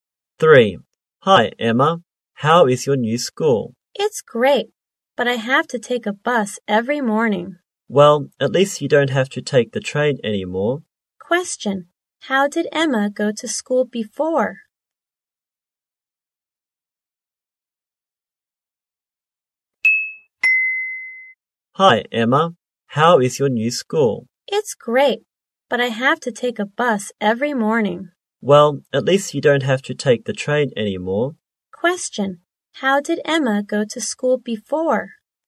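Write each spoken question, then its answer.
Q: Question. How did Emma go to school before?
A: By train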